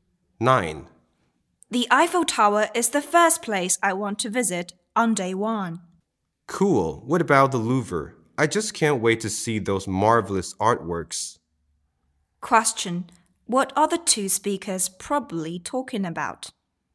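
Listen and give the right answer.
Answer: A trip to Paris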